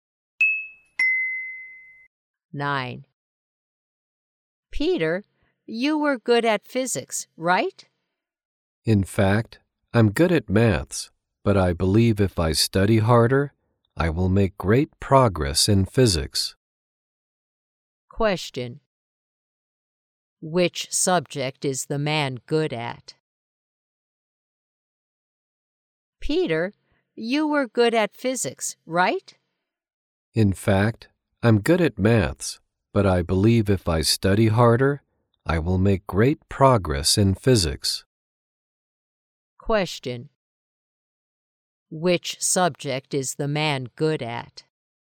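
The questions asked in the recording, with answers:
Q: Which subject is the man good at?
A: Maths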